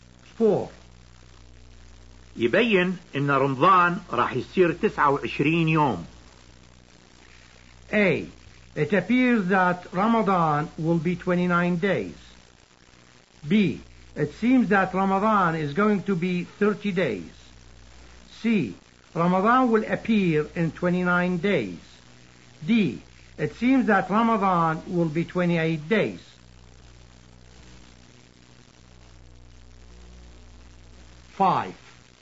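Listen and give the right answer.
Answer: A: It appears that Ramadan will be 29 days.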